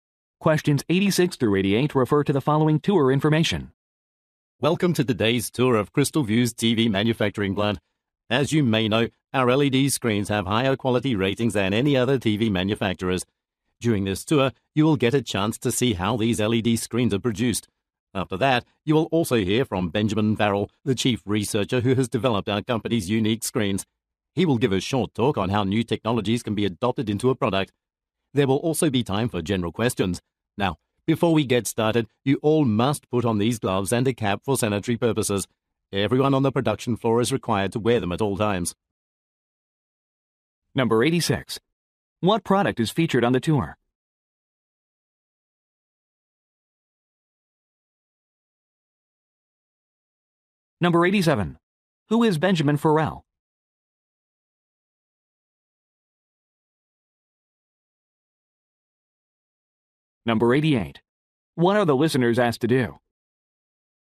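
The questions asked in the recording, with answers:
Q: What product is featured on the tour?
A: TVs with LED screens

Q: Who is Benjamin Farrell?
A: The chief researcher

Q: What are the listeners asked to do?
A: Put on gloves and a cap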